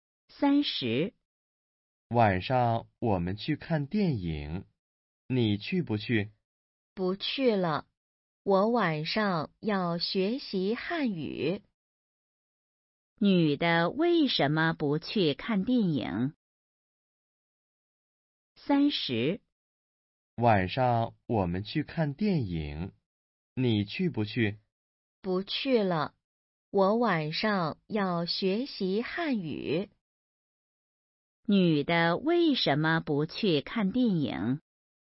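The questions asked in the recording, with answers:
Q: 女的为什么不去看电影?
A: 晚上要学习汉语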